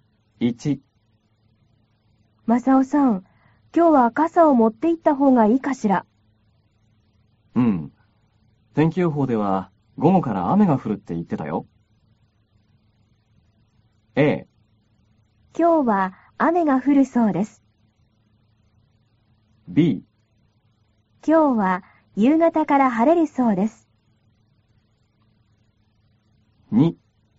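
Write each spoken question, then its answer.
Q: A。今日は雨が降るそうです。B。今日は夕方から晴れるそうです。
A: A: 今日は雨が降るそうです。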